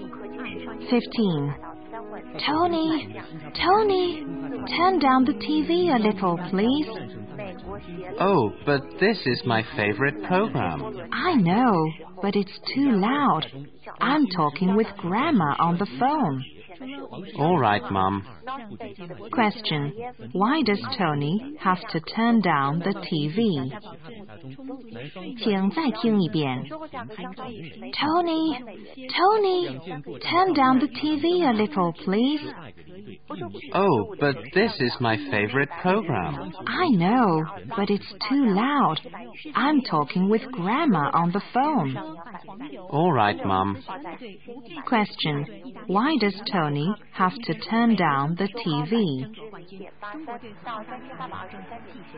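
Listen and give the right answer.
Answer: It's too loud and his mom is talking with Grandma on the phone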